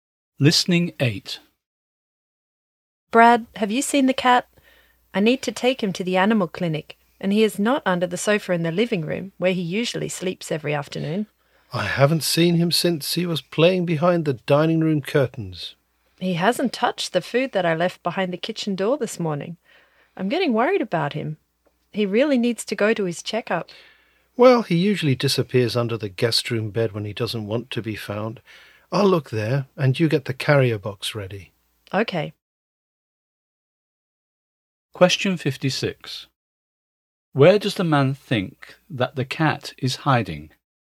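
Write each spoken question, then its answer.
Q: Where does the man think that the cat is hiding?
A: Under the guest room bed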